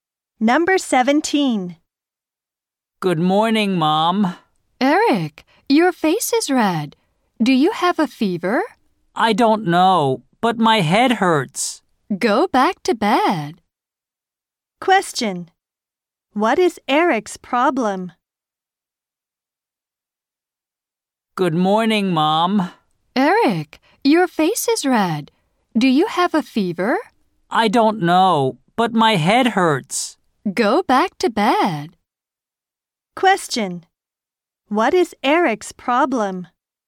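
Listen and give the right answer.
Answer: His head hurts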